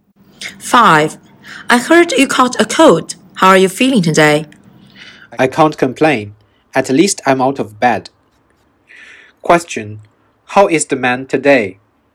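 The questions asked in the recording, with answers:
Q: How is the man today?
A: Better; he is out of bed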